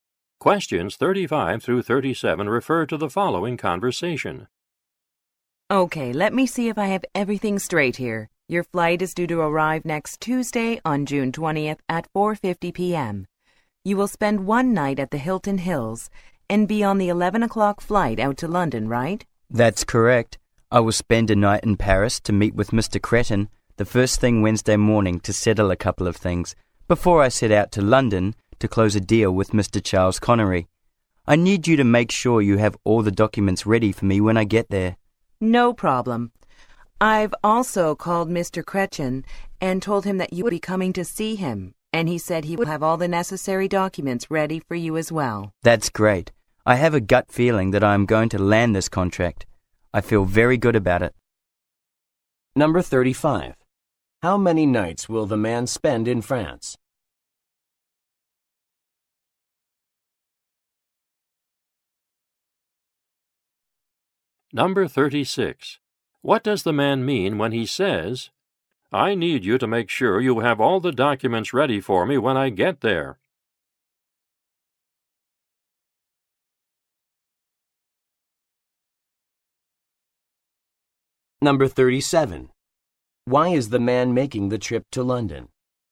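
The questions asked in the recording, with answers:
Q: How many nights will the man spend in France?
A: One night

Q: Why is the man making the trip to London?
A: To close a deal with Mr. Charles Connery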